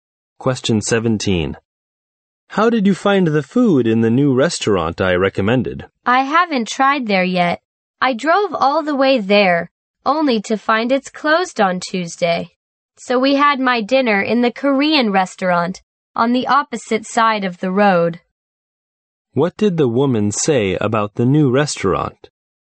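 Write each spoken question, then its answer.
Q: What did the woman say about the new restaurant?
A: It was closed on Tuesday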